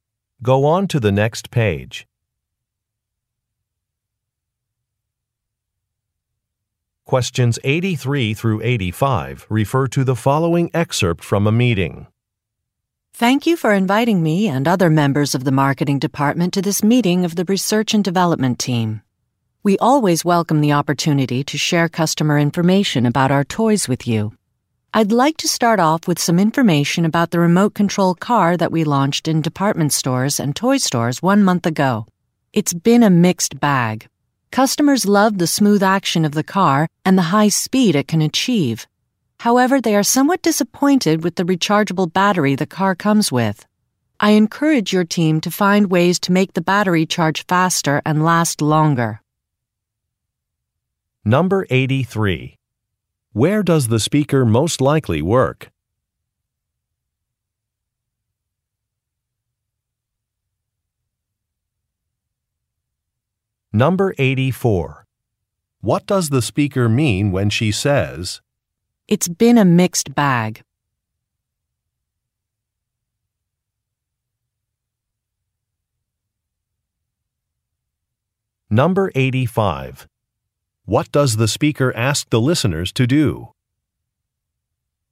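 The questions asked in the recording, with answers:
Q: Where does the speaker most likely work?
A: At a toy company

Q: What does the speaker mean when she says,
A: Customer feedback has been both positive and negative

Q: What does the speaker ask the listeners to do?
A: Improve the car's battery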